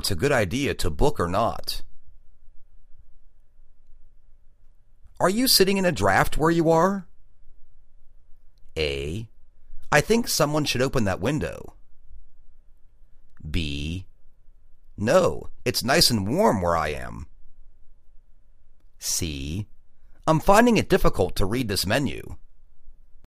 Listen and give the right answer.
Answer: No. it's nice and warm where I am.